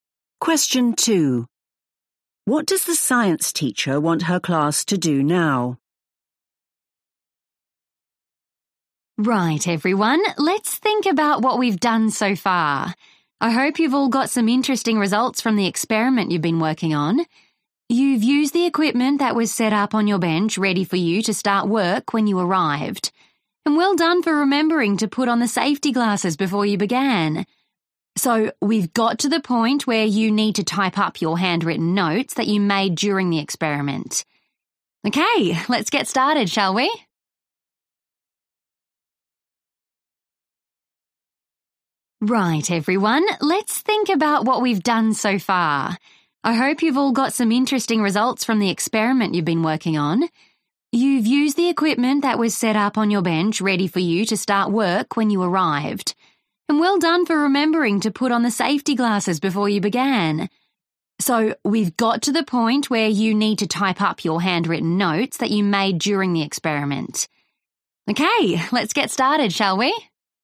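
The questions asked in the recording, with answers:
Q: What does the science teacher want her class to do now?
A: type up their handwritten notes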